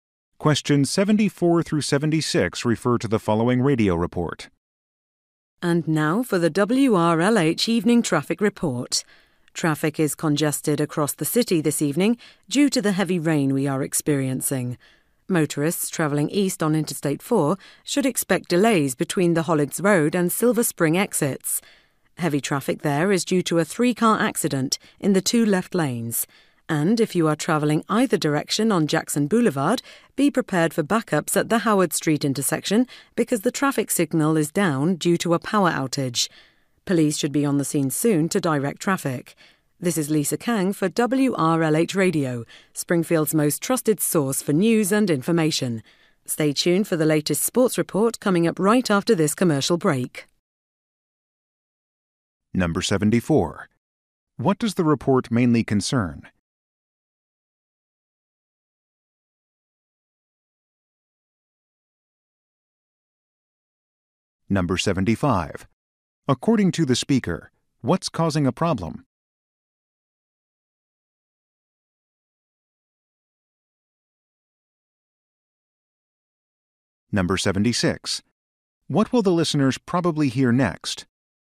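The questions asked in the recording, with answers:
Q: What does the report mainly concern?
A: Traffic conditions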